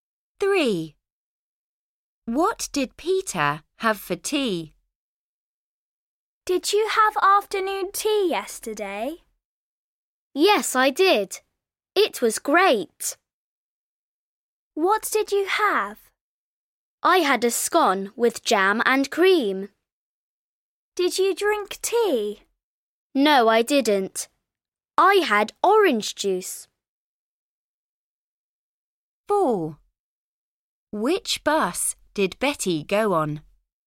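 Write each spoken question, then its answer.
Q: What did Peter have for tea?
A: A scone with jam and cream, and orange juice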